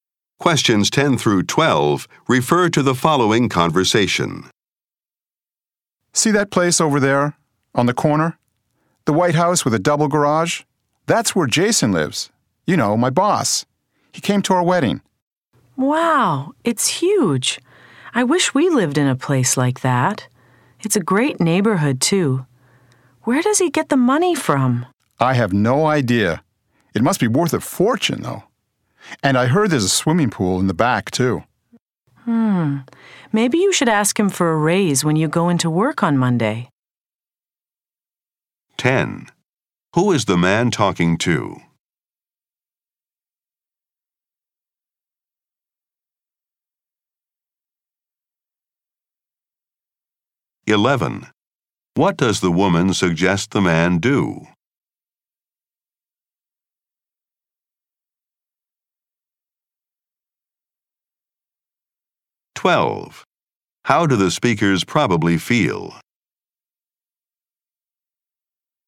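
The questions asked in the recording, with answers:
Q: Who is the man talking to?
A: His wife

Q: What does the woman suggest the man do?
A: Ask his boss for a raise

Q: How do the speakers probably feel?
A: Envious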